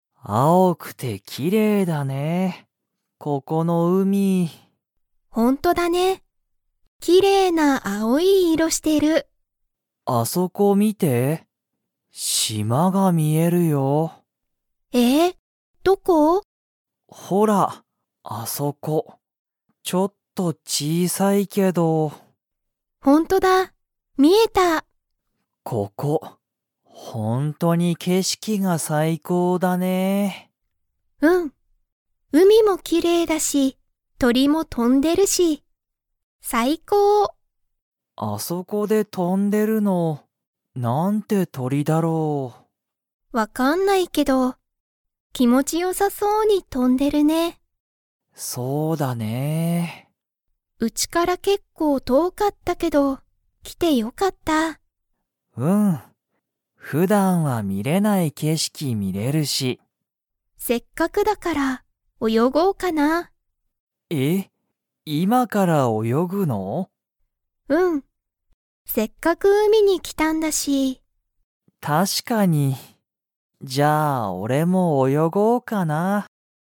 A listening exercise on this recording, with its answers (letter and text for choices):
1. あそこに、ちょっと小(ちい)さい が見(み)える。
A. 島(しま)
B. 海(うみ)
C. 鳥(とり)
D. 店(みせ)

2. ユリとカイトは、今(いま)から泳(およ)ぎますか?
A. はい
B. いいえ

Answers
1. A. 島(しま)
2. A. はい

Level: Level 4